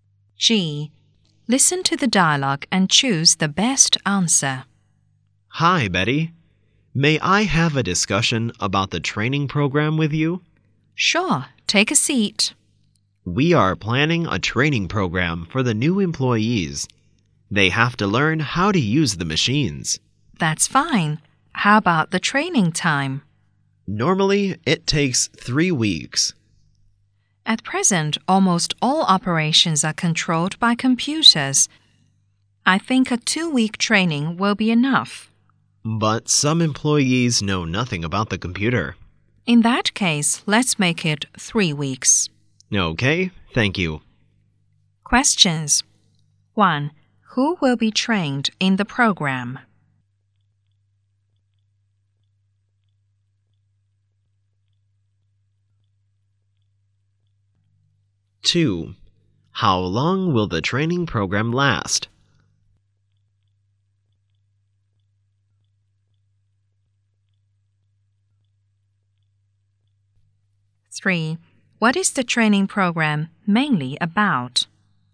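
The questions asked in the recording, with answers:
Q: Who will be trained in the program?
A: The new employees

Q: How long will the training program last?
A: 3 weeks

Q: What is the training program mainly about?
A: How to use the machines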